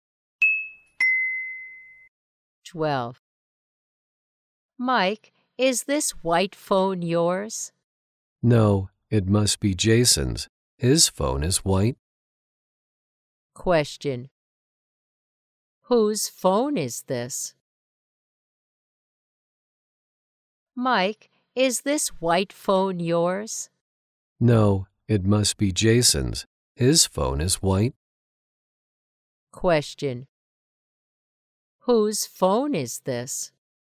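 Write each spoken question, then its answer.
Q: Whose phone is this?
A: Jason's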